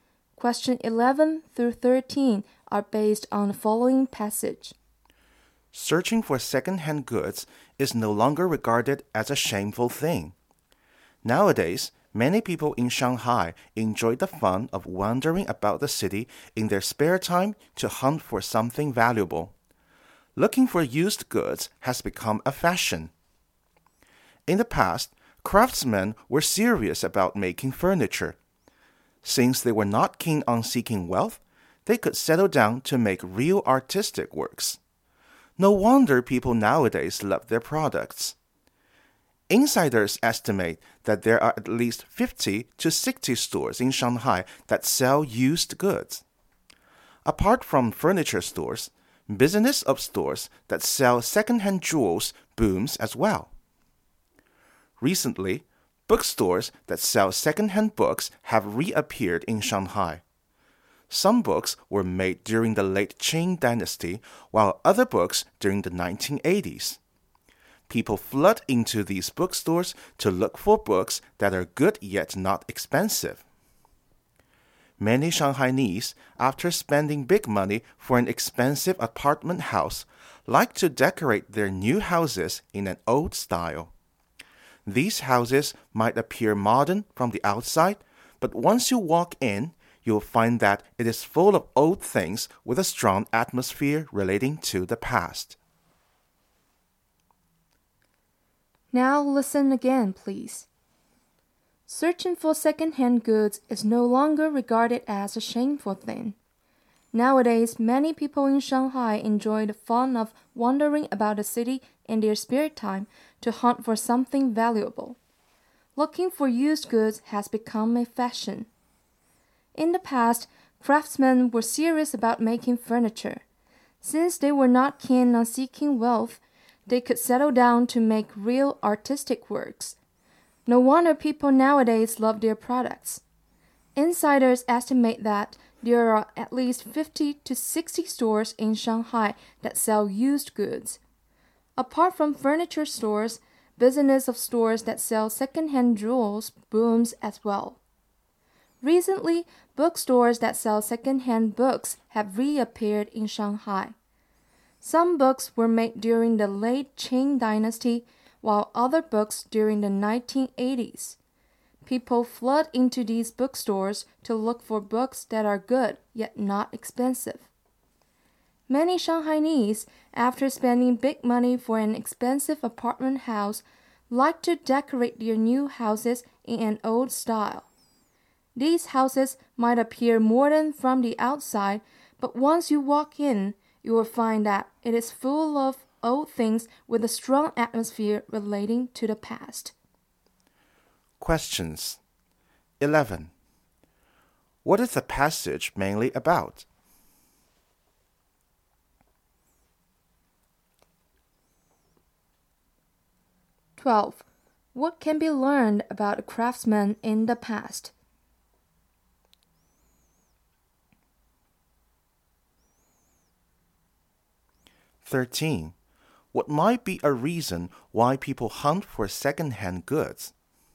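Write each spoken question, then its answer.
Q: What is the passage mainly about?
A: Hunting for second-hand goods has become fashionable in Shanghai.

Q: What can be learned about craftsmen in the past?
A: They were serious about their work and not keen on wealth.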